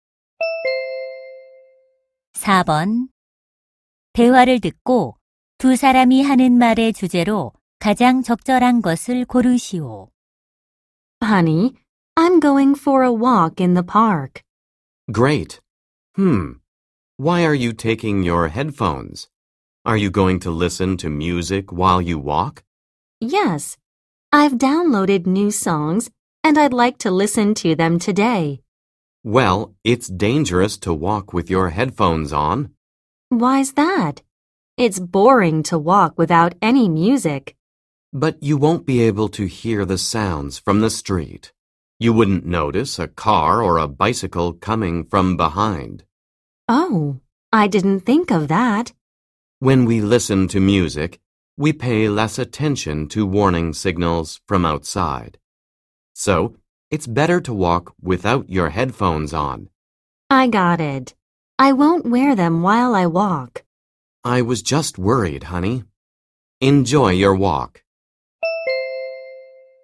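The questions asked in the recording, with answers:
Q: 대화를 듣고 두 사람이 하는 말의 주제로 가장 적절한 것을 고르시오.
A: 헤드폰을 끼고 걷는 것의 위험성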